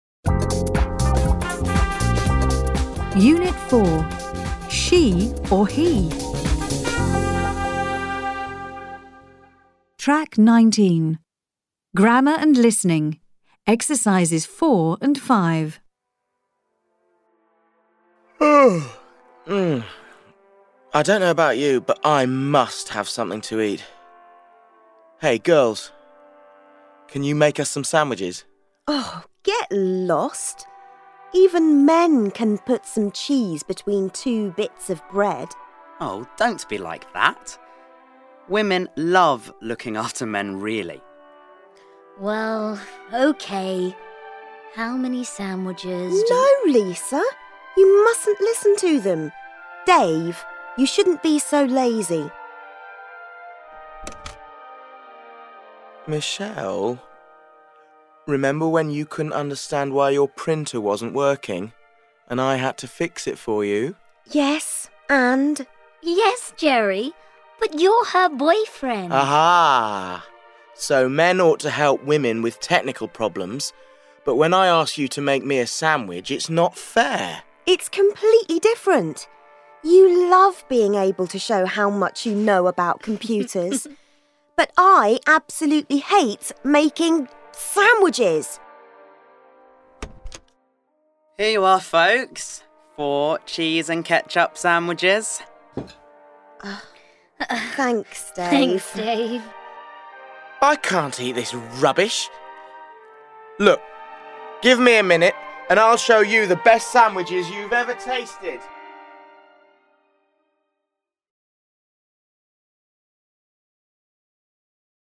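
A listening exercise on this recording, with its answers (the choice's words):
Complete the sentences with the correct verbs. Use the clues in brackets. Then listen to the dialogue and check.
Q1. Hey girls, _____ (请求)you make us some sandwiches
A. can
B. should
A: can

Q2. Even men _____ (能力)put some cheese between two bits of bread.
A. need to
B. can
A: can

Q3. No Lisa, you _____ (不应该)listen to them. Dave! You _____ (建议)be so lazy!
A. can't; need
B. mustn't; shouldn't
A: mustn't; shouldn't

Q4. Remember when you _____(能力)understand why your printer wasn't working and I _____ (不得不) fix it for you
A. couldn't; had to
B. need;must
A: couldn't; had to

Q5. Men _____(责任)help women with technical problems.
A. need to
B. ought to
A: ought to

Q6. You love _____ (能力) to show how much you know about computers.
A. being able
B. can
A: being able

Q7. I _____ (可能性) eat this rubbish!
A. should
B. 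can't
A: can't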